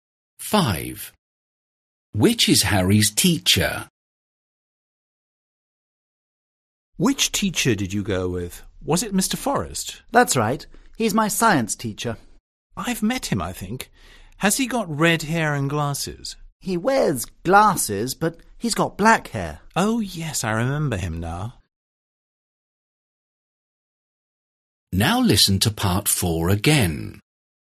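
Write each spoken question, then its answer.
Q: Which is Harry's teacher?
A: the man with glasses and black hair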